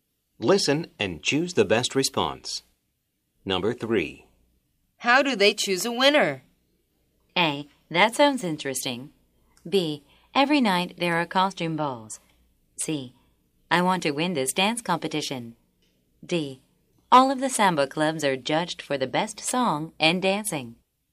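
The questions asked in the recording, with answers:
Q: How do they choose a winner?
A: D: All of the samba clubs are judged for the best song and dancing.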